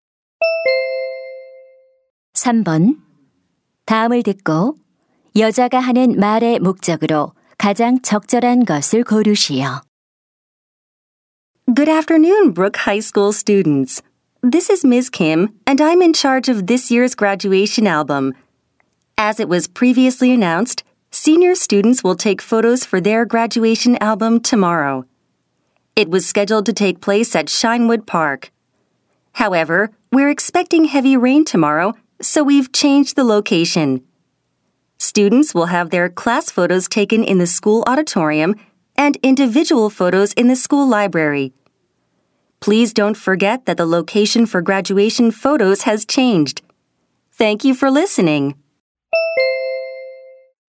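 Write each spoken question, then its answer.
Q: 다음을 듣고 여자가 하는 말의 목적으로 가장 적절한 것을 고르시오.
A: 졸업 앨범 사진 촬영 장소 변경을 알리려고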